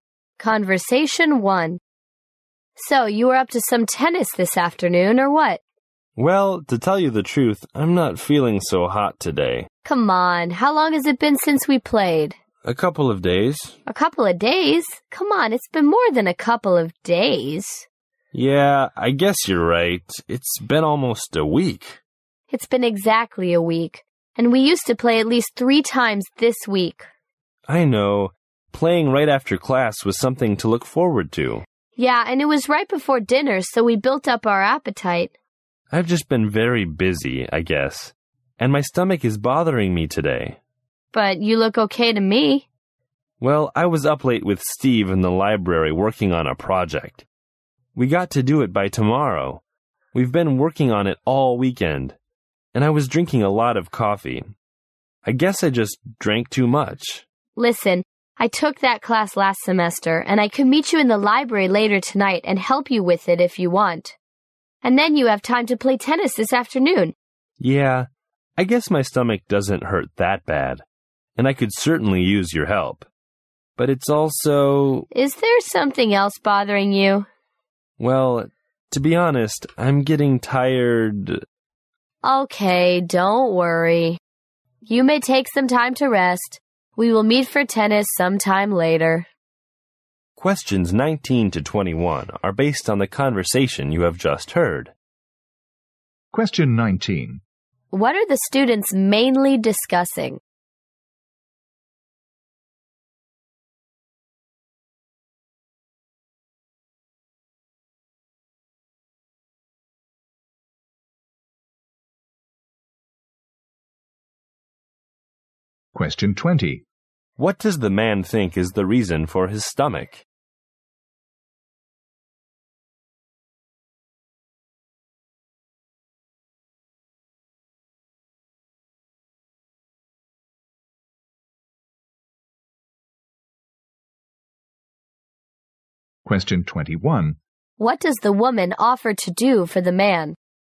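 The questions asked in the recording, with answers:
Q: What does the man think is the reason for his stomach?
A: He drank too much coffee.

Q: What does the woman offer to do for the man?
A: Help him with his project in the library.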